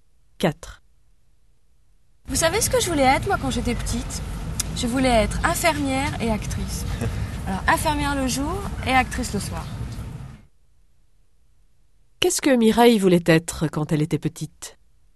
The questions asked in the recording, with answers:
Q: Qu'est-ce que Mireille voulait être quand elle était petite?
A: Infirmière et actrice. Infirmière le jour et actrice le soir.